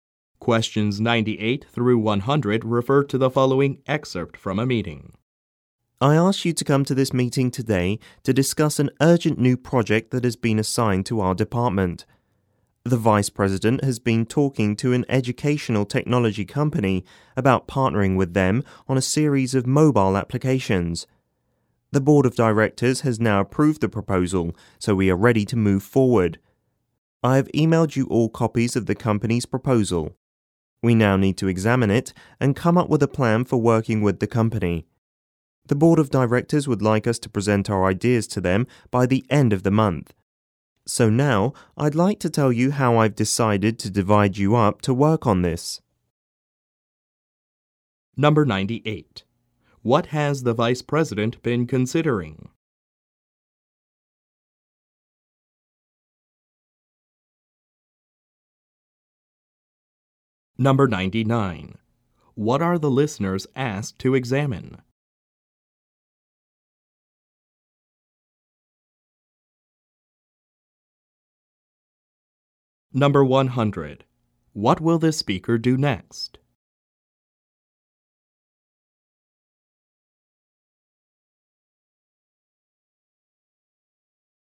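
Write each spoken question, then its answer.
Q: What has the vice president been considering?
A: Partnering with an educational technology company on a series of mobile applications

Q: What are the listeners asked to examine?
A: The company's proposal

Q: What will the speaker do next?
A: Explain how the listeners will be divided up to work on the project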